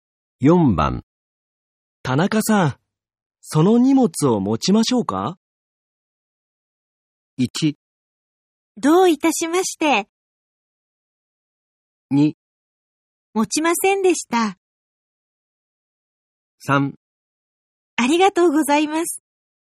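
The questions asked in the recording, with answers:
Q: 田中さん、その荷物を持ちましょうか?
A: 3: ありがとうございます。

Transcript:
1
どういたしまして。
2
持もちませんでした。
3
ありがとうございます。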